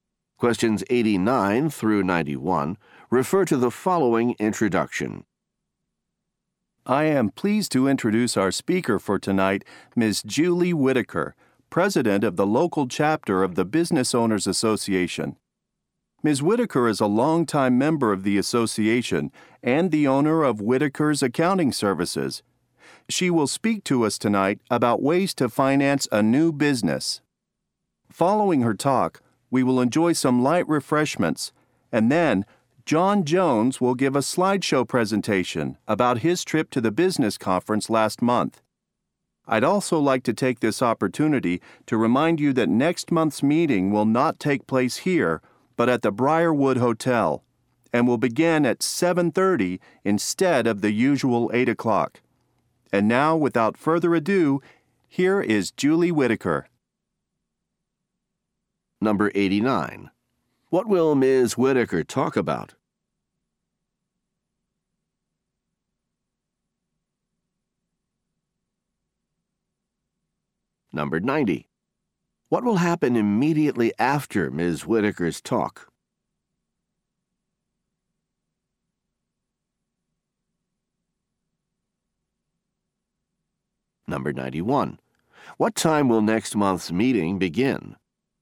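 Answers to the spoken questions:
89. Ways to finance a new business
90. Light refreshments will be served
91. 7:30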